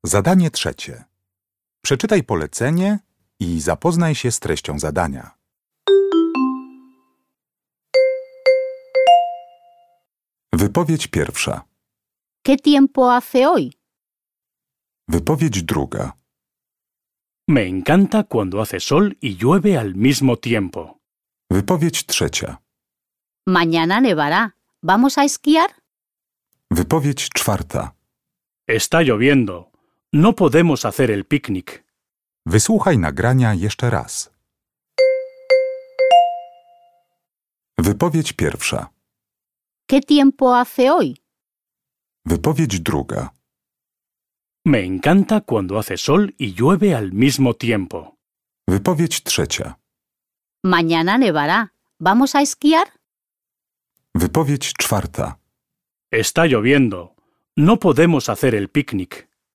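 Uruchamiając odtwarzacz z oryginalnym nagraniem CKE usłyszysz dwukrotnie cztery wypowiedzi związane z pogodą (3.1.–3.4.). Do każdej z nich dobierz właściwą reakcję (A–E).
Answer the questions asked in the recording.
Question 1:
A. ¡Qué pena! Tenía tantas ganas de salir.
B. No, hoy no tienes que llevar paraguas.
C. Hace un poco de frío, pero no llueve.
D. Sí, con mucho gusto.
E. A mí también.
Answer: C. Hace un poco de frío, pero no llueve.
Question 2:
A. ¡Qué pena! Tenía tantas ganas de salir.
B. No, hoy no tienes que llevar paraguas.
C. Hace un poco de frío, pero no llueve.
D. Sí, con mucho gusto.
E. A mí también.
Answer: E. A mí también.
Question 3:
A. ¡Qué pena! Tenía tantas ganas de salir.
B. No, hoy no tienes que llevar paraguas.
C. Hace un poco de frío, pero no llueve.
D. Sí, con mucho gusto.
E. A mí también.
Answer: D. Sí, con mucho gusto.
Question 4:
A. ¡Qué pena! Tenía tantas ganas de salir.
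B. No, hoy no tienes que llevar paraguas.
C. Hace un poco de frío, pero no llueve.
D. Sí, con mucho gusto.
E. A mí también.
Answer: A. ¡Qué pena! Tenía tantas ganas de salir.

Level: ósmoklasisty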